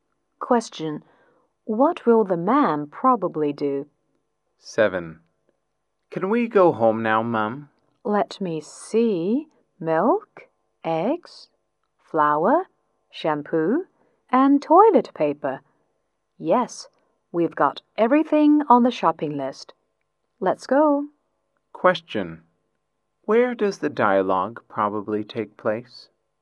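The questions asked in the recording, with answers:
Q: Where does the dialogue probably take place?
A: In a supermarket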